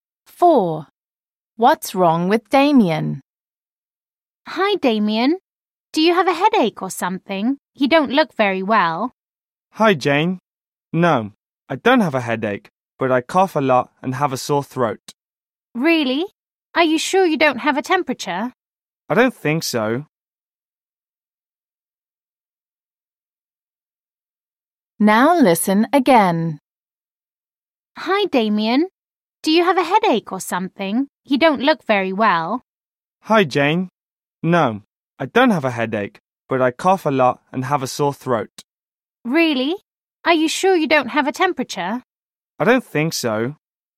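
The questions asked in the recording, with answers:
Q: What's wrong with Damien?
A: He has a cough and a sore throat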